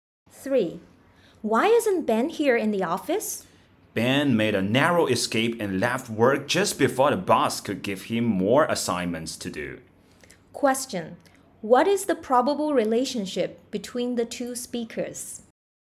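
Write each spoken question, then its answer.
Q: What is the probable relationship between the two speakers?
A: Colleagues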